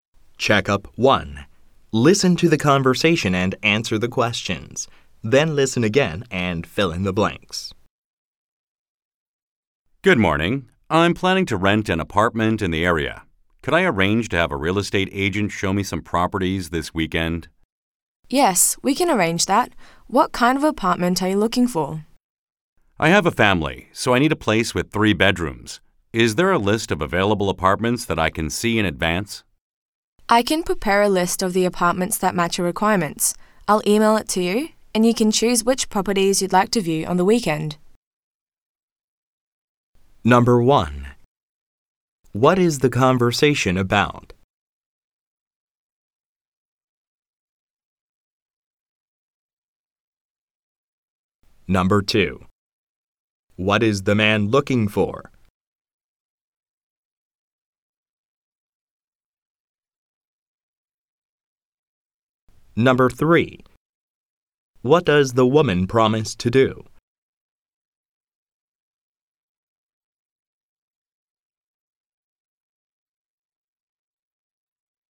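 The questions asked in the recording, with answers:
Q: What is the conversation about?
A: Arranging to view apartments to rent with a real estate agent

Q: What is the man looking for?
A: An apartment with 3 bedrooms

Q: What does the woman promise to do?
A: Email him a list of apartments that match his requirements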